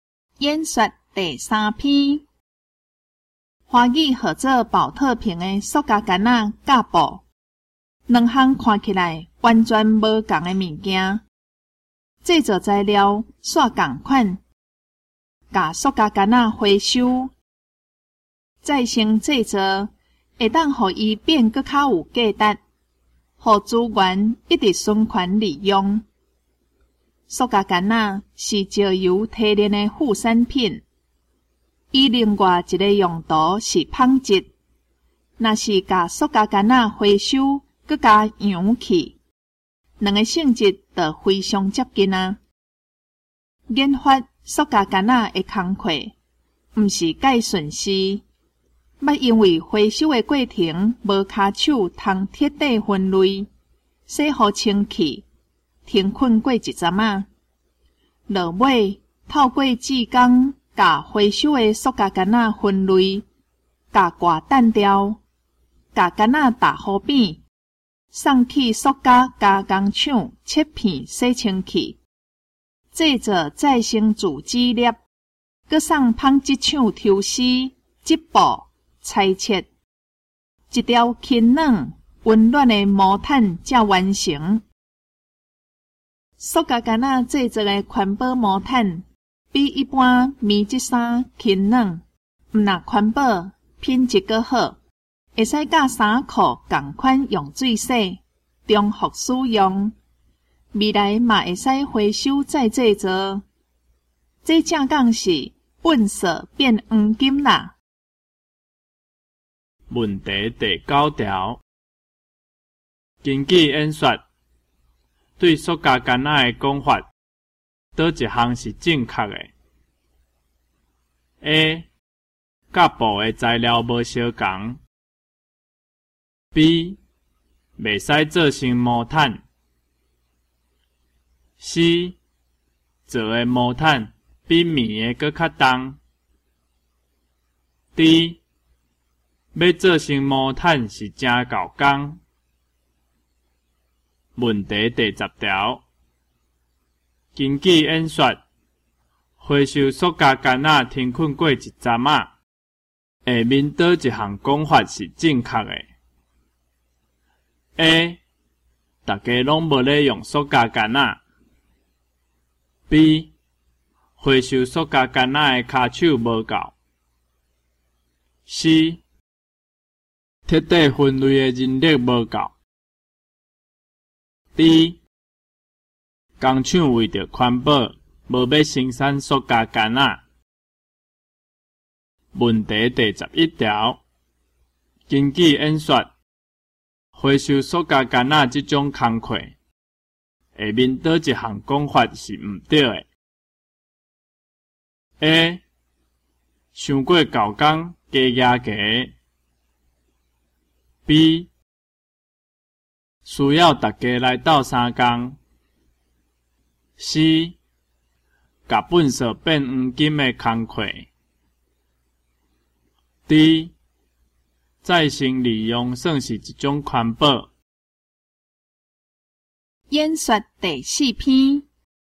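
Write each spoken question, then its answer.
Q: 根据演说,对塑胶杆仔的讲法,哪一项是正确的 ?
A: D: 要做成毛毯是真够工

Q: 根据演说,回收塑胶杆仔停困过一阵啊,下面倒一项讲法是正确的 ?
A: C: 彻底分类的人力无够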